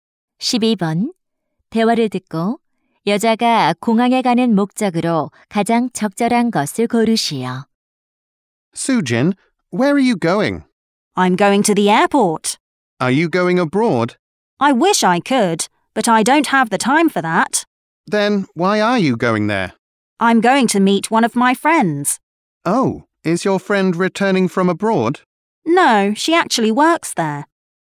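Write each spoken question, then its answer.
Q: 대화를 듣고 여자가 공항에 가는 목적으로 가장 적절한 것을 고르시오.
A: 공항에서 일하는 친구를 만나려고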